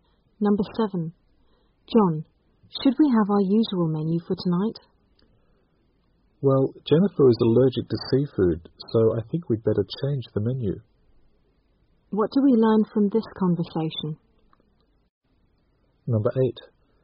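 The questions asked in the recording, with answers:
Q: What do we learn from this conversation?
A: They will change the menu because Jennifer is allergic to seafood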